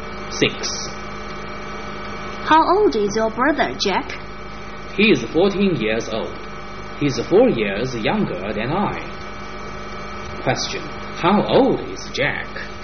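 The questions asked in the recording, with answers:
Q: How old is Jack?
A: 18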